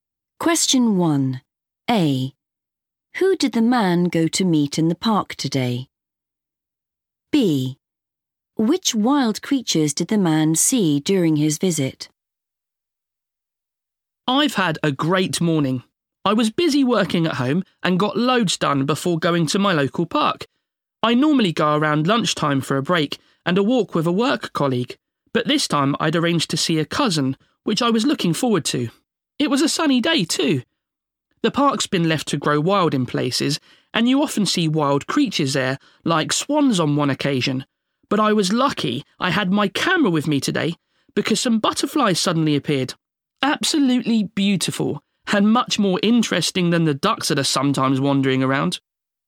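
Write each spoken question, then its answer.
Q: Who did the man go to meet in the park today?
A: a cousin

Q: Which wild creatures did the man see during his visit?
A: butterflies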